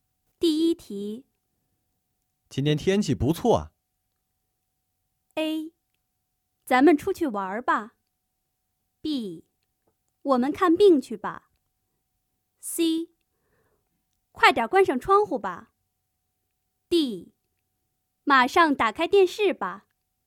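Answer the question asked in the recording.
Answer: A: 咱们出去玩吧。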